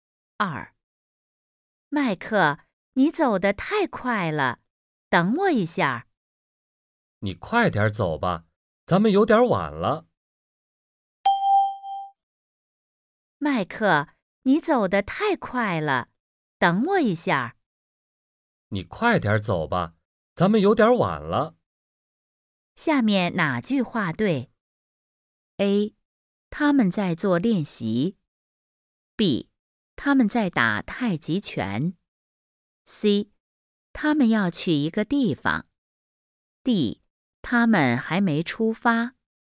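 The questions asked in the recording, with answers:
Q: 下面哪句话对?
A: C: 他们要去一个地方。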